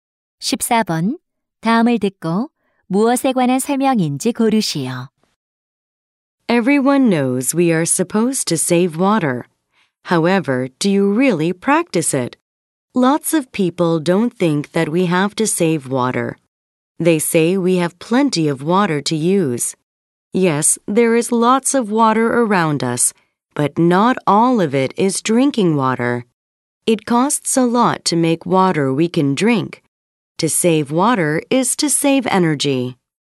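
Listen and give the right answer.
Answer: 물 절약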